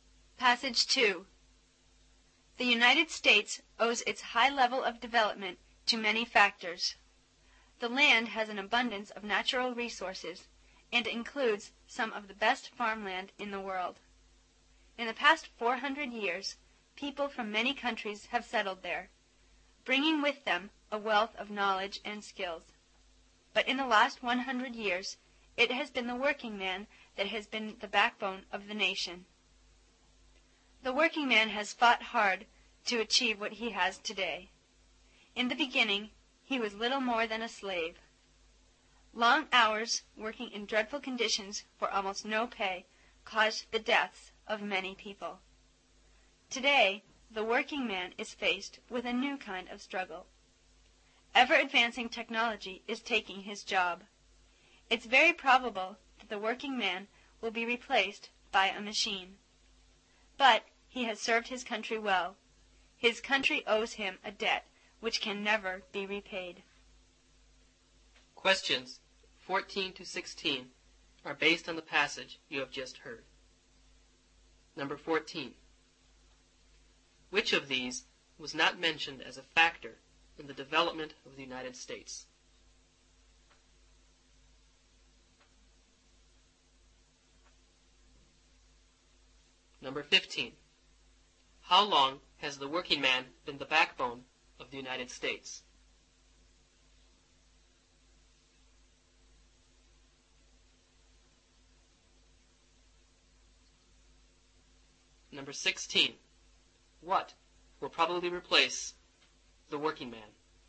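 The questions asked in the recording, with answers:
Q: How long has the working man been the backbone of the United States?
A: For the last 100 years

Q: What will probably replace the working man?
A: A machine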